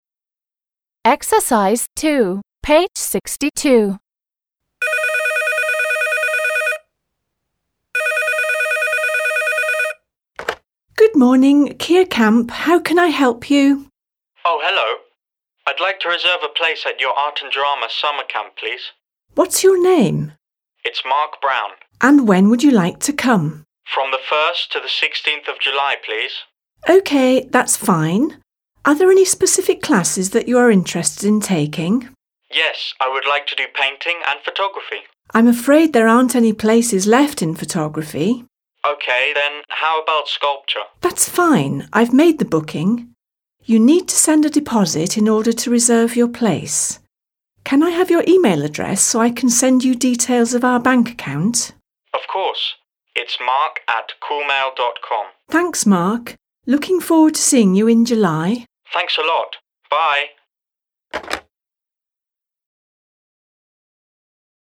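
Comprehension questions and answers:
2. The sentences above are from a dialogue between a teenager and a receptionist at a camp. Who says each sentence? Listen and check.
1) How can I help you?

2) What's your name?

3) And when would you like to come?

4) Are there any specific classes you are interested in taking?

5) Can I have your e-mail address?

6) I'd like to reserve a place at your camp.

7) I'm afraid there aren't any places left in photography.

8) You need to send a deposit in order to reserve your place.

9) Looking forward to seeing you in July.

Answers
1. the receptionist
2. the receptionist
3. the receptionist
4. the receptionist
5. the receptionist
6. the teenager
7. the receptionist
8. the receptionist
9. the receptionist

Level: 7 класс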